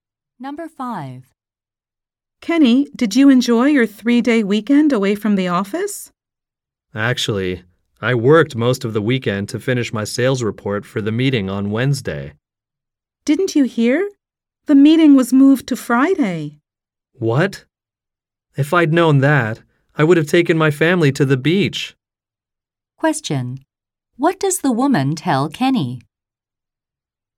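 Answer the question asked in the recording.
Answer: The meeting was moved to Friday.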